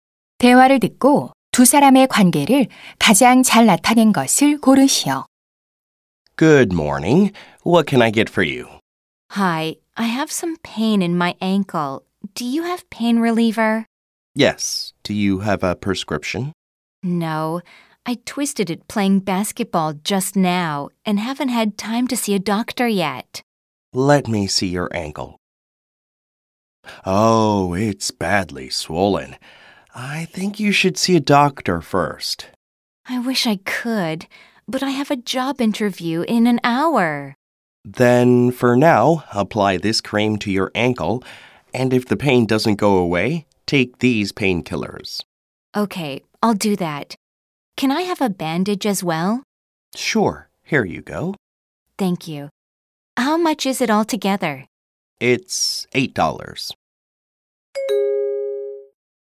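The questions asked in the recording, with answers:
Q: 5번 대화를 듣고 두 사람의 관계를 가장 잘 나타낸 것을 고르시오.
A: 약사 — 손님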